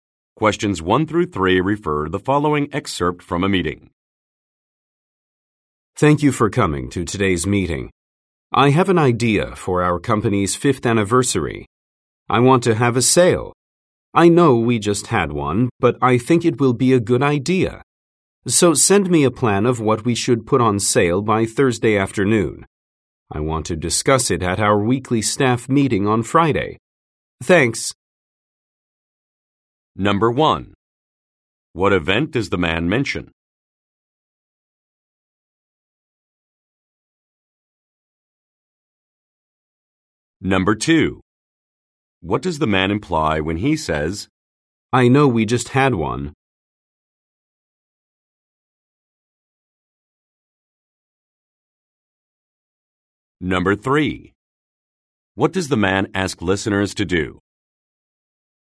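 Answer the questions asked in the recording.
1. The company's 5th anniversary
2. The company recently had a sale
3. Send a plan of items to put on sale by Thursday afternoon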